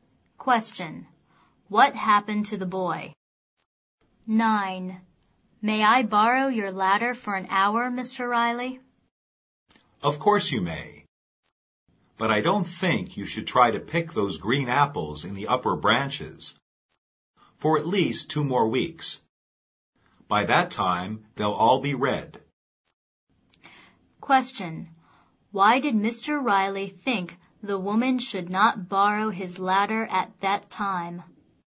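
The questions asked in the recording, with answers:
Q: Why did Mr. Riley think the woman should not borrow his ladder at that time?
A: The apples are still green and won't be ripe for 2 more weeks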